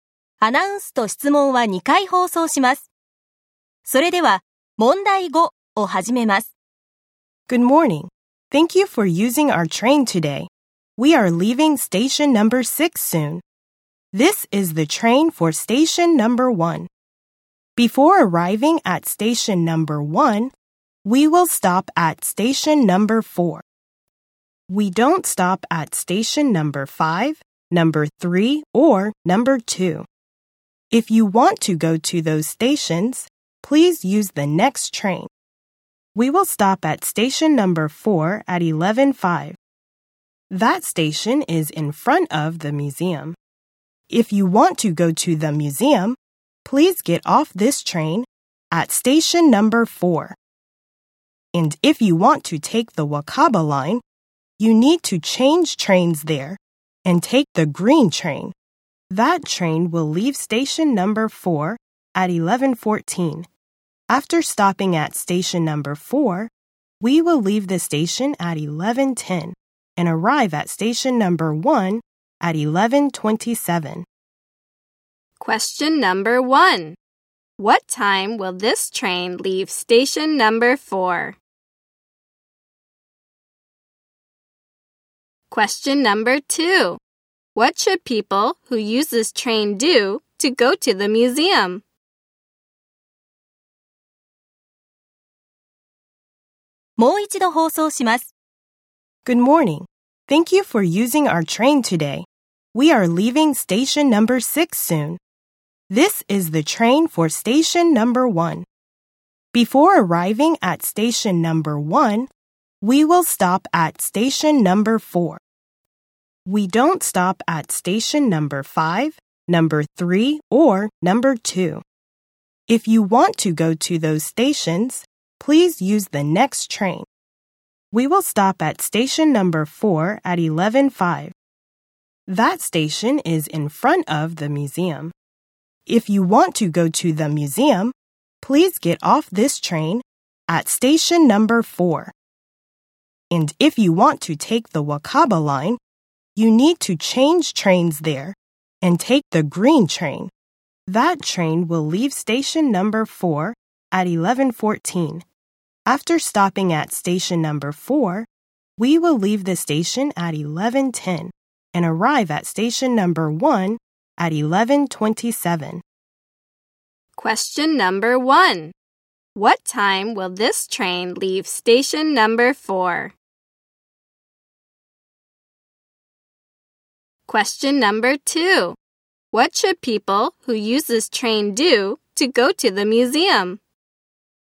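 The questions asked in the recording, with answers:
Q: What time will this train leave station number 4?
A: At 11:10

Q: What should people who use this train do to go to the museum?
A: Get off the train at station number 4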